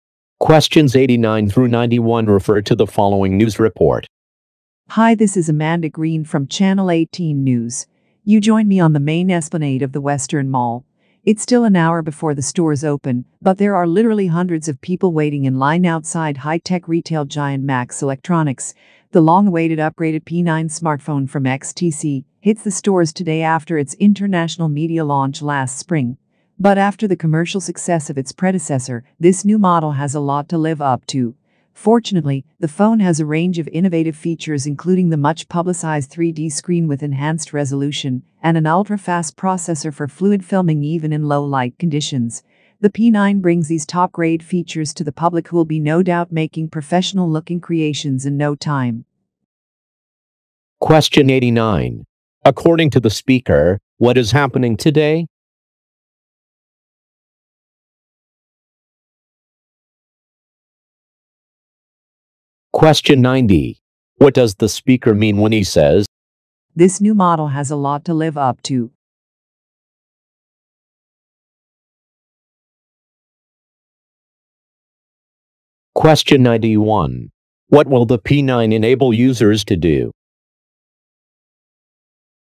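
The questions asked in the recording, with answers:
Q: According to the speaker, what is happening today?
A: A new smartphone, the P9, goes on sale

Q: What will the P9 enable users to do?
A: Make professional-looking videos, even in low light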